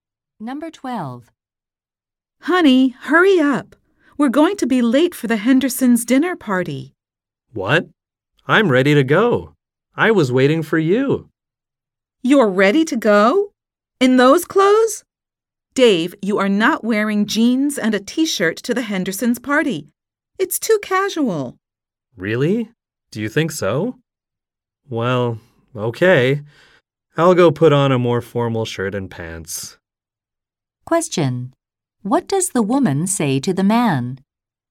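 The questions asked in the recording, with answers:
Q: What does the woman say to the man?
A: His clothes are too casual for the party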